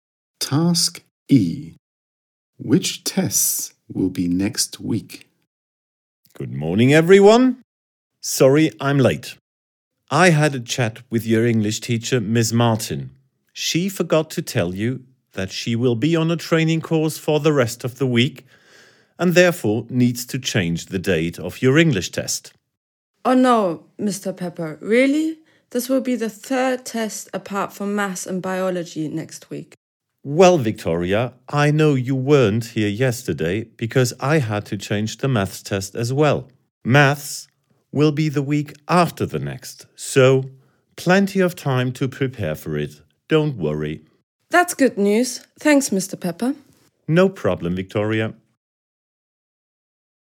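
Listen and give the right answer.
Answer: English and biology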